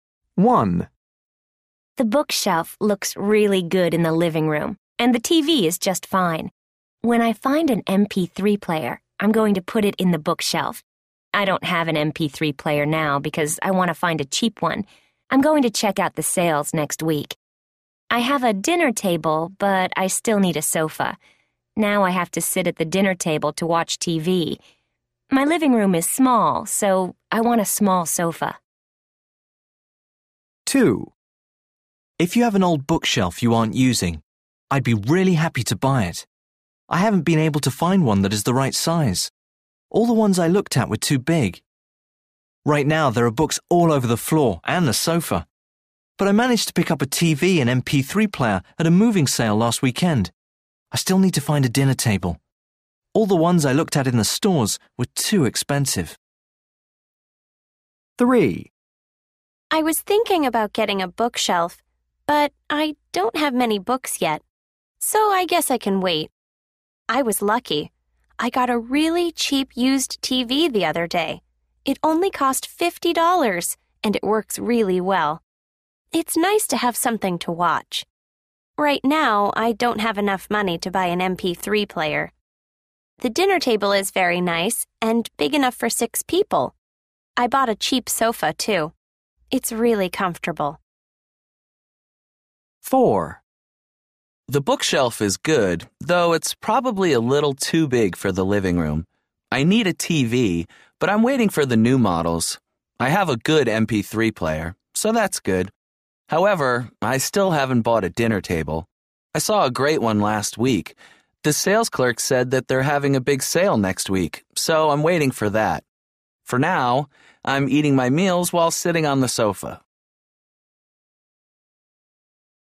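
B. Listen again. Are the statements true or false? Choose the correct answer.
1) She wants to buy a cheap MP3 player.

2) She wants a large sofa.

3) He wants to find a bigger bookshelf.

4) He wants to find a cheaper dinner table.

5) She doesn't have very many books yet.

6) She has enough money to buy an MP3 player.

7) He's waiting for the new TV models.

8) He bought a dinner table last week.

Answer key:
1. True
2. False
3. False
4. True
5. True
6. False
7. True
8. False

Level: Luyện nghe trình độ A1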